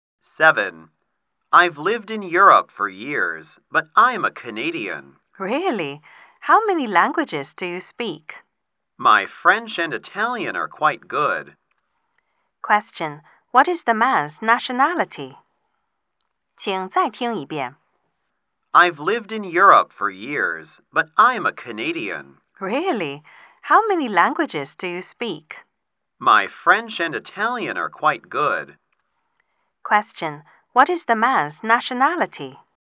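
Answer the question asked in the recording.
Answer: Canadian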